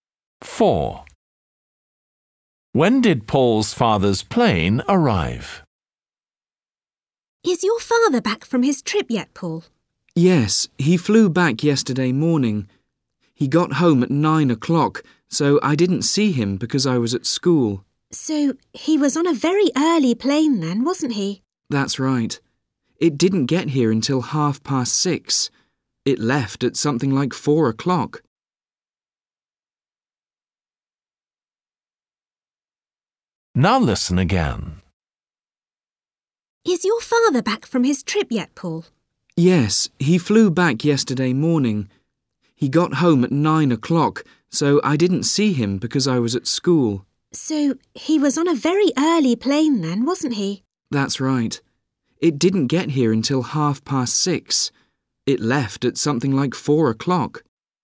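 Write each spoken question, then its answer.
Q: When did Paul's father's plane arrive?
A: at 6:30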